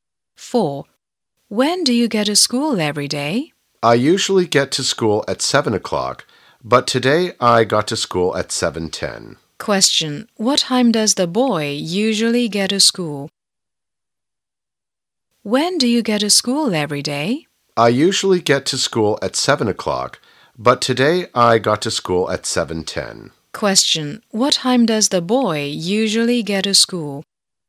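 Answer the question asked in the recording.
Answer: At 7 o'clock.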